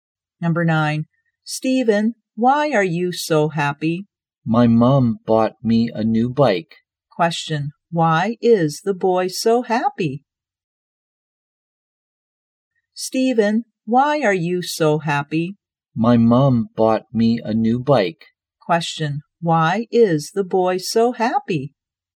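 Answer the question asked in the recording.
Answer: His mom bought him a new bike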